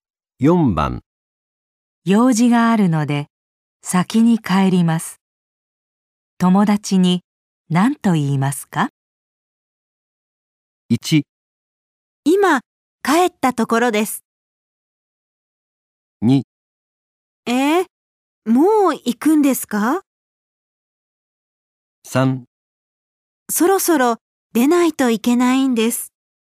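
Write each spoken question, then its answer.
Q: 用事があるので、先に帰ります。友達に何と言いますか?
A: 3: そろそろ出ないといけないんです。

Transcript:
1
今、帰ったところです。
2
え?もう行くんですか。
3
そろそろ出ないといけないんです。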